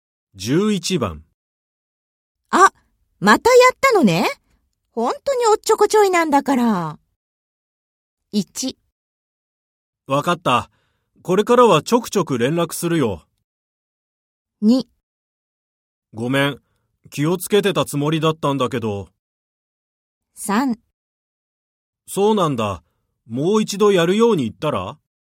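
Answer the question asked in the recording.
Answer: 2: ごめん、気をつけてたつもりだったんだけど。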